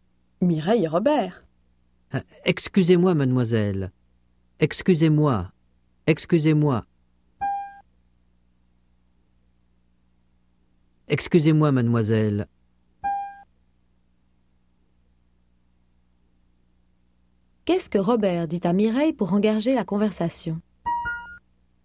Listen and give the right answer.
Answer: Il dit « Excusez-moi, mademoiselle ».